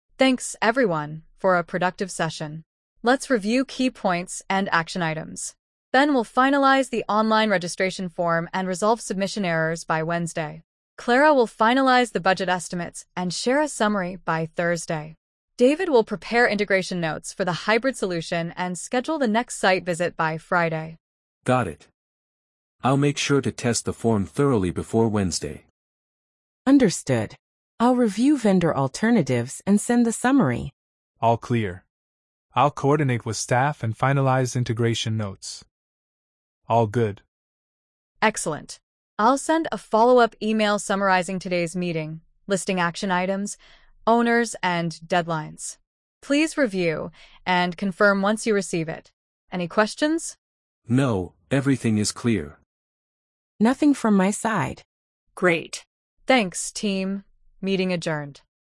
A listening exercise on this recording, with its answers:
Complete the phrases as you listen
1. Let's review key ______ and action items.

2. Ben will finalize the online registration ______.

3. I'll make sure to test the form thoroughly ______ Wednesday.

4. I'll review vendor alternatives and send the ______.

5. I'll coordinate ______ staff and finalize integration notes.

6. I'll send a follow-up ______ summarizing today's meeting.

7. Please review and confirm ______ you receive it.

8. Thanks, team, meeting ______.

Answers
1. points
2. form
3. before
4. summary
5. with
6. email
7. once
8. adjourned

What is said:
ANNA: Thanks, everyone, for a productive session. Let's review key points and action items. Ben will finalize the online registration form and resolve submission errors by Wednesday. Clara will finalize the budget estimates and share a summary by Thursday. David will prepare integration notes for the hybrid solution and schedule the next site visit by Friday.
BEN: Got it. I'll make sure to test the form thoroughly before Wednesday.
CLARA: Understood. I'll review vendor alternatives and send the summary.
DAVID: All clear. I'll coordinate with staff and finalize integration notes.
ANNA: Excellent. I'll send a follow-up email summarizing today's meeting, listing action items, owners, and deadlines. Please review and confirm once you receive it. Any questions?
BEN: No, everything is clear.
CLARA: Nothing from my side.
DAVID: All good.
ANNA: Great. Thanks, team, meeting adjourned.
Perfect! "Thanks, team, meeting adjourned."